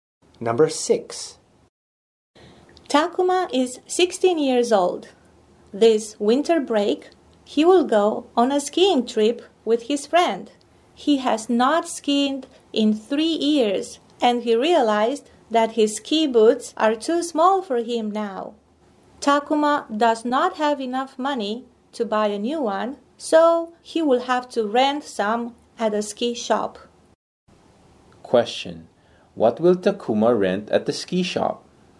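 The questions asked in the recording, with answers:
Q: What will Takuma rent at the ski shop?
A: Ski boots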